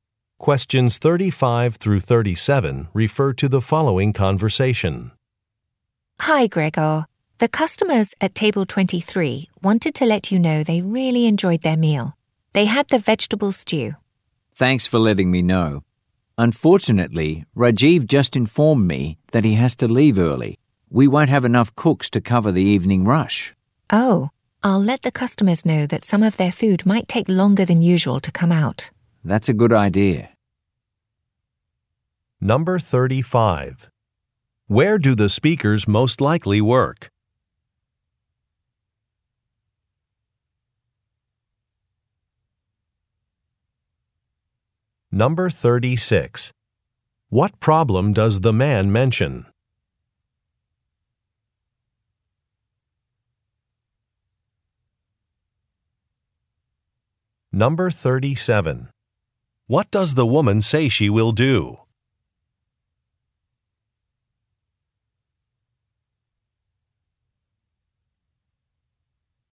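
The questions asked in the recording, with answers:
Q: Where do the speakers most likely work?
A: At a restaurant

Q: What problem does the man mention?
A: A cook has to leave early, so they will be short-staffed

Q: What does the woman say she will do?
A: Tell customers their food may take longer than usual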